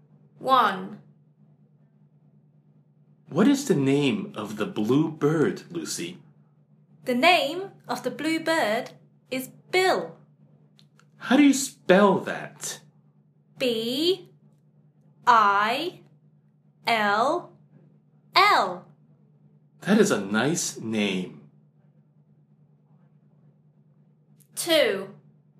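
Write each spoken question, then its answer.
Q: What is the name of the blue bird, Lucy?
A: Bill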